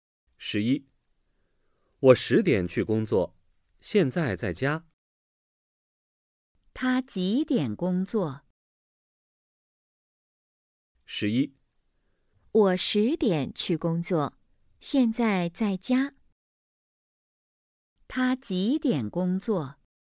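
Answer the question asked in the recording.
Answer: 10点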